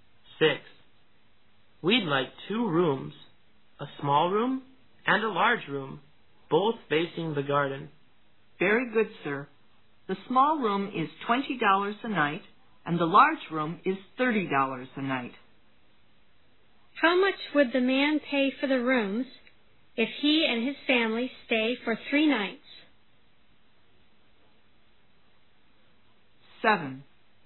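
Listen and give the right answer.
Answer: $150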